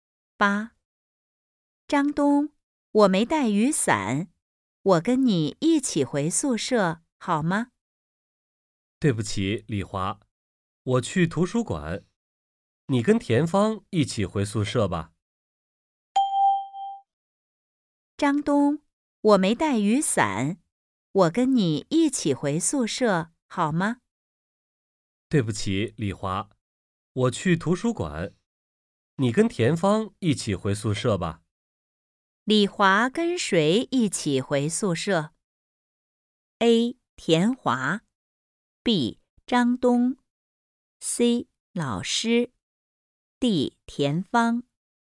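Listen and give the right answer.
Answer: D: 田芳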